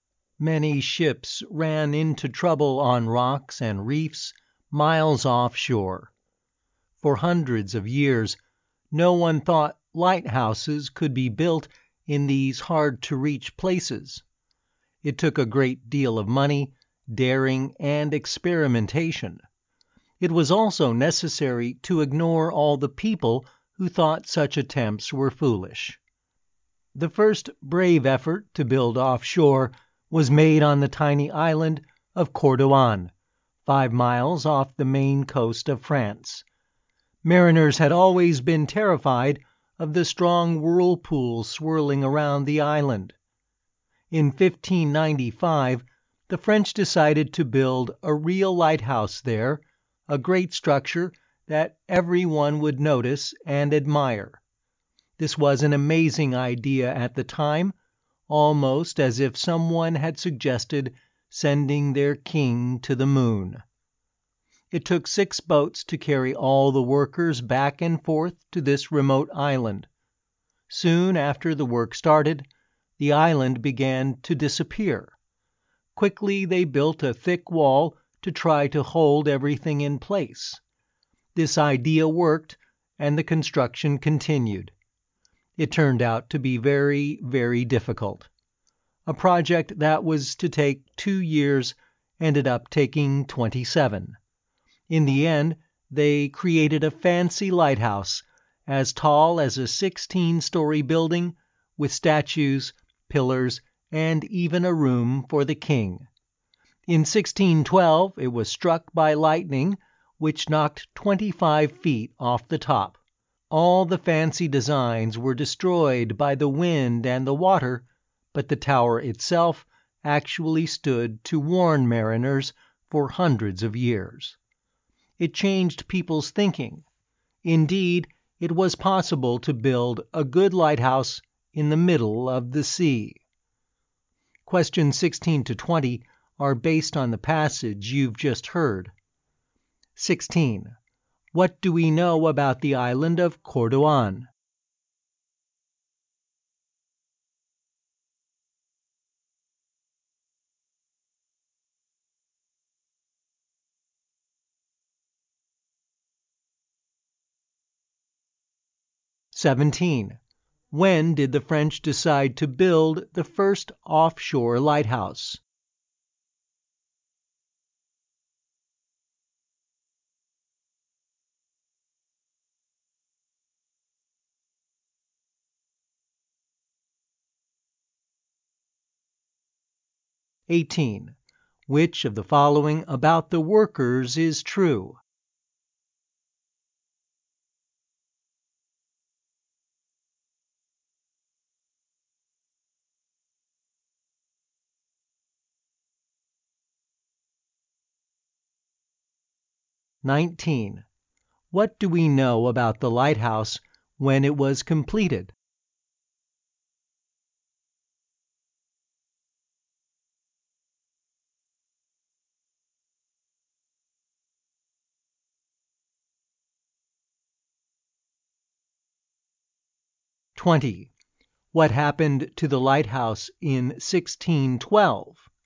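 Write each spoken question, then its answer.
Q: What do we know about the island of Cordouan?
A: It is 5 miles off the coast of France, with a strong whirlpool around it

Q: When did the French decide to build the first offshore lighthouse?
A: In 1595

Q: What happened to the lighthouse in 1612?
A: It was struck by lightning, which knocked 25 feet off the top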